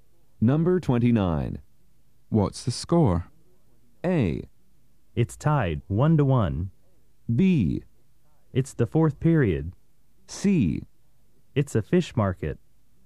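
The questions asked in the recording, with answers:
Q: What's the score?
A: A: It's tied, 1-1.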